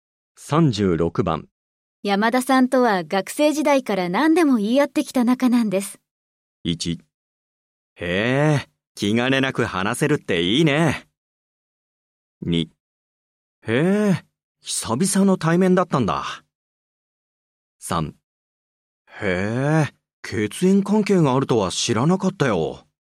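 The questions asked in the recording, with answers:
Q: 山田さんとは学生時代から何でも言い合ってきた仲なんです。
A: 1: へえ、気兼ねなく話せるっていいね。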